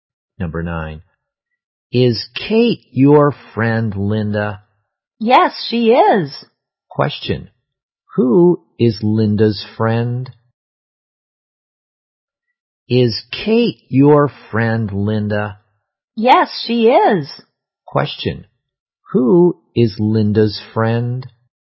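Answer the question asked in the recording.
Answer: Kate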